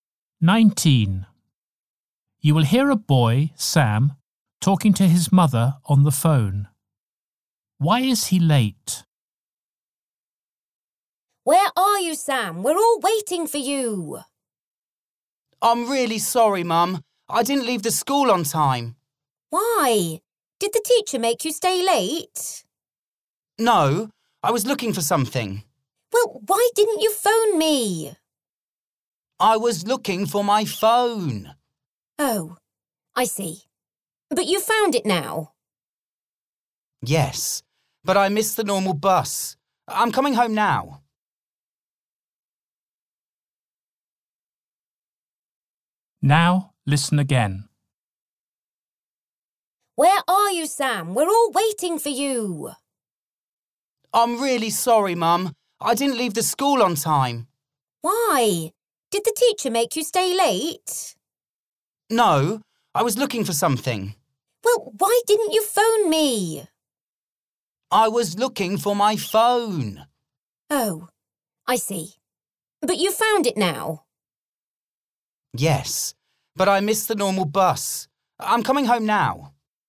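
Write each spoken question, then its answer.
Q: Why is he late?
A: He was looking for his phone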